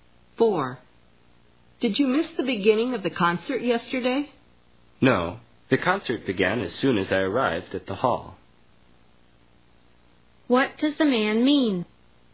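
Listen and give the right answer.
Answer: He didn't miss it; the concert began just as he arrived.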